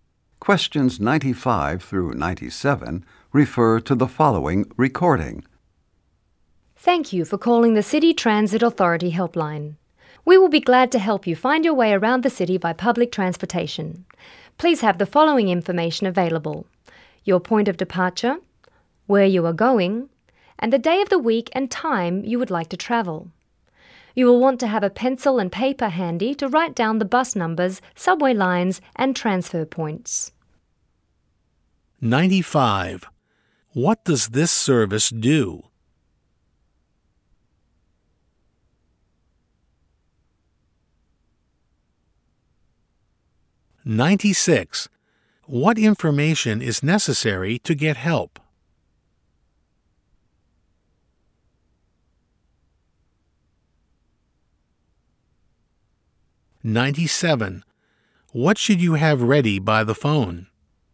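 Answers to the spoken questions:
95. Helps people find their way around the city by public transportation
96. Point of departure, destination, and day and time of travel
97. A pencil and paper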